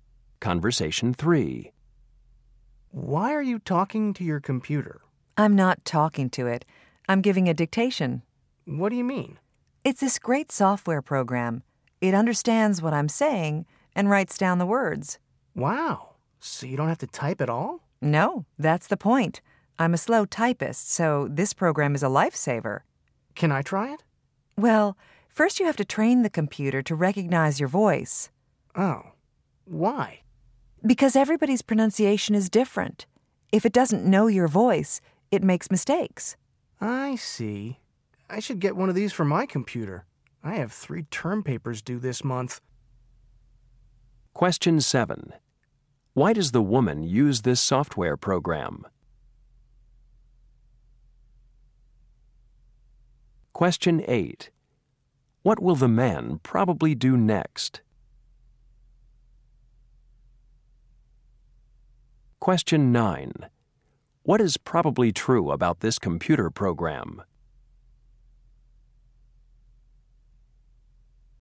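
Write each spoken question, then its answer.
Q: Why does the woman use this software program?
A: She is a slow typist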